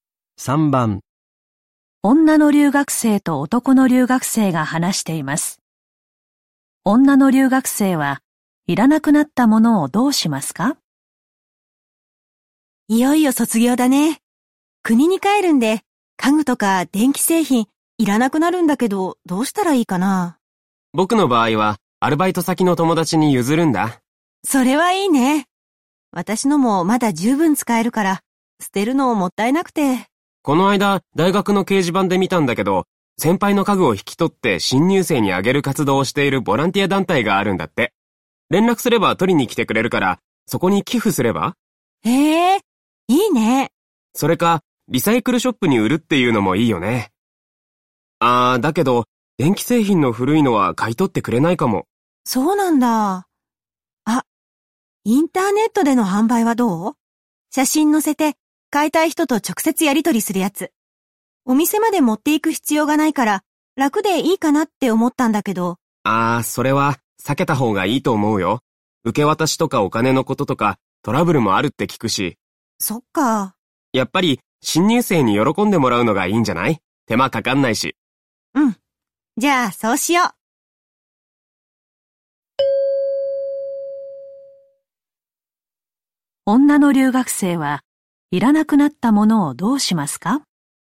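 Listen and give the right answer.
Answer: ボランティア団体に寄付する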